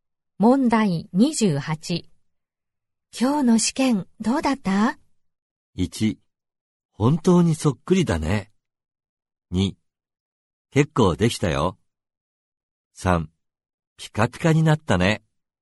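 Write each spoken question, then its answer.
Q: 今日の試験どうだった?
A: 2: 結構できたよ。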